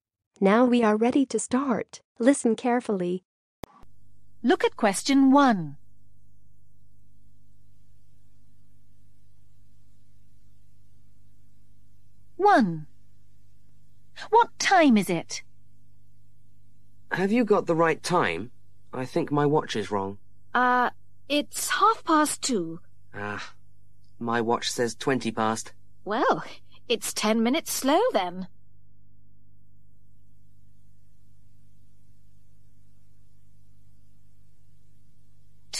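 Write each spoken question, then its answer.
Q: What time is it?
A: 2:30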